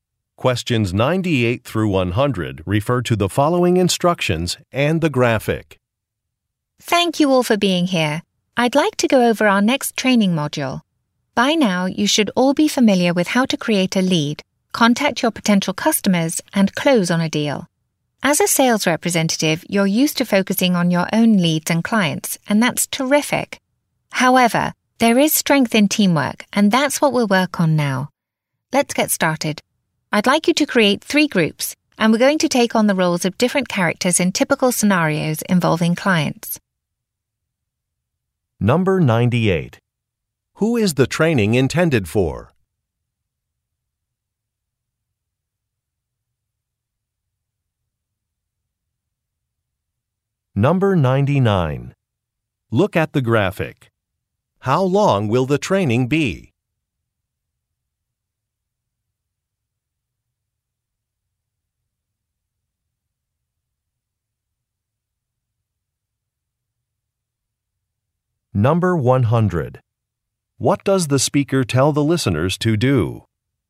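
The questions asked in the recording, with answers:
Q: Who is the training intended for?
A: Sales representatives

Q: What does the speaker tell the listeners to do?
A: Create three groups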